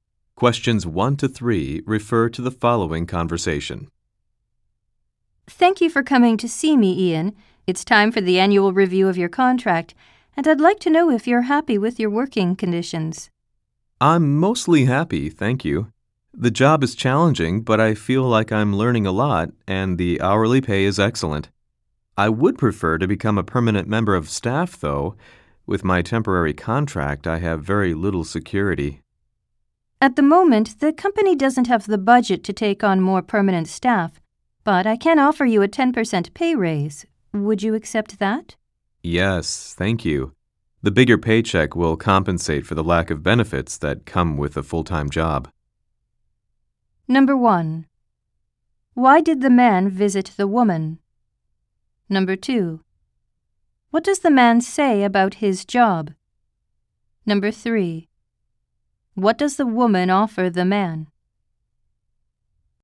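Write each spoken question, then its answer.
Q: Why did the man visit the woman?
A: For the annual review of his contract

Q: What does the man say about his job?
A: It is challenging, but he is learning a lot and the pay is excellent

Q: What does the woman offer the man?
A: A 10% pay raise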